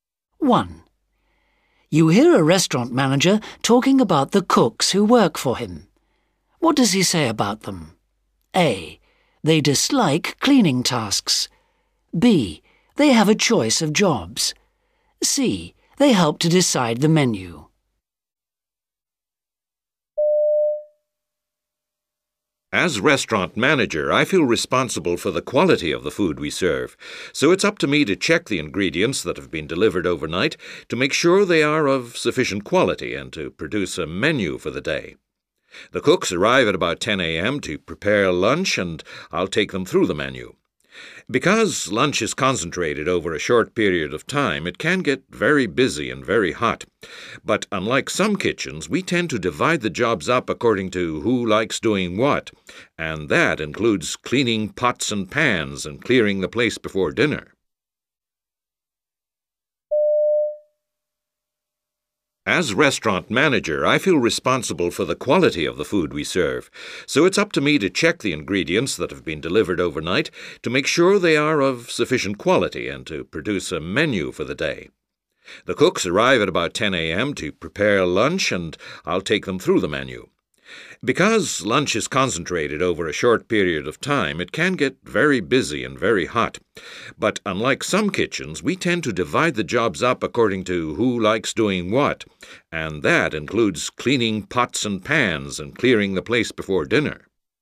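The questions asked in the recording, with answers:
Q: What does he say about them?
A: B: They have a choice of jobs.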